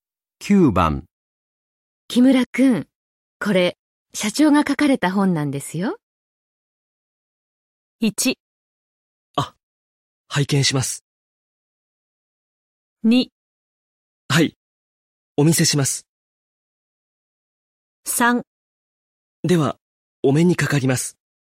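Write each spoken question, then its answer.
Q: 木村くん、これ、社長が書かれた本なんですよ。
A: 1: あ、拝見します。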